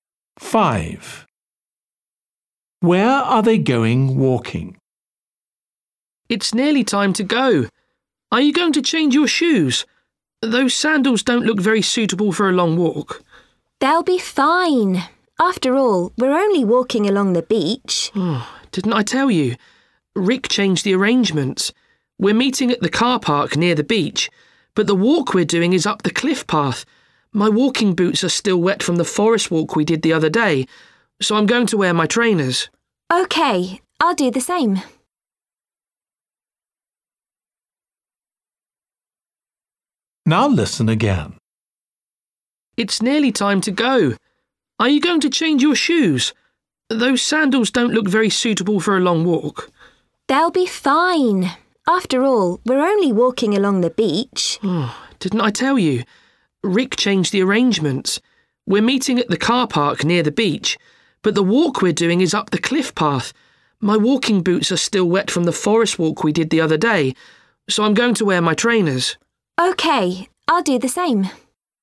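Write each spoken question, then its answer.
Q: Where are they going walking?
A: Up the cliff path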